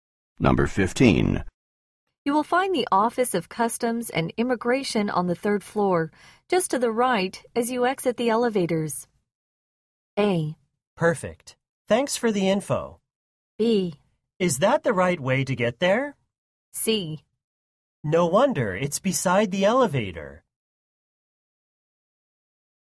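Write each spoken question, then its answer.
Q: You will find the Office of Customs and Immigration on the third floor, just to the right as you exit the elevators.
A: A: Perfect. Thanks for the info.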